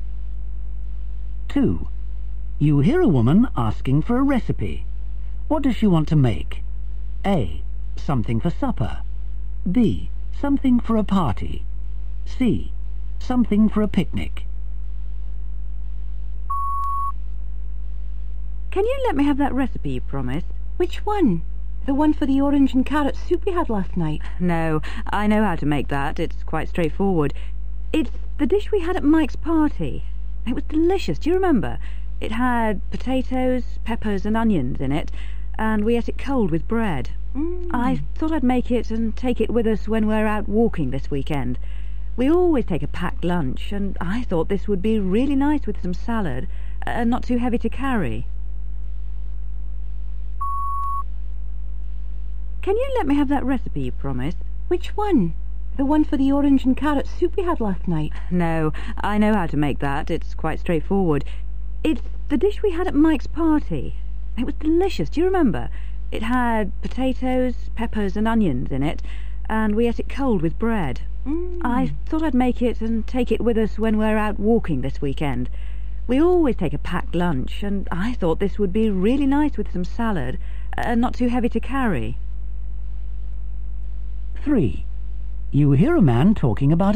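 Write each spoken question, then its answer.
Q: What does she want to make?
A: C: Something for a picnic.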